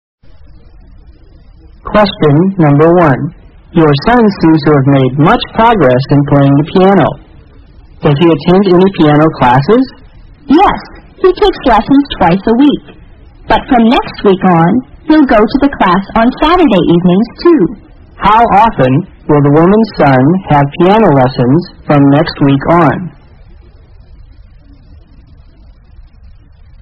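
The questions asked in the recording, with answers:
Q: How often will the woman's son have piano lessons from next week on?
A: Three times a week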